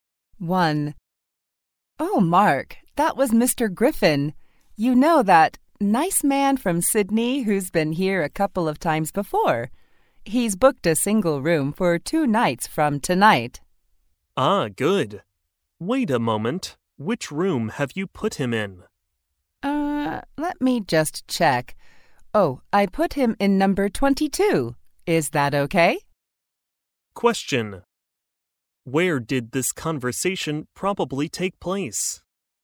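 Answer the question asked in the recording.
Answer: In a hotel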